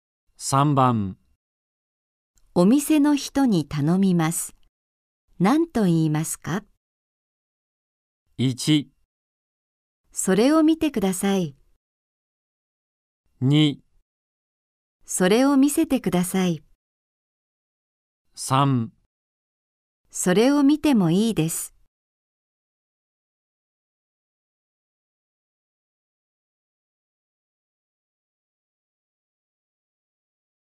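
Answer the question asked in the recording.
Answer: 2: それを見せてください。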